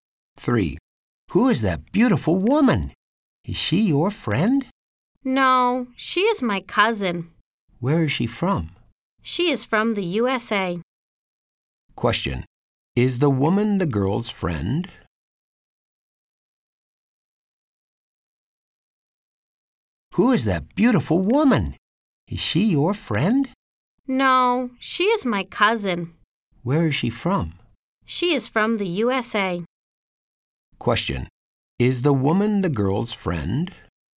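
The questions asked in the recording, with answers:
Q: Is the woman the girl's friend?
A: No, she is her cousin.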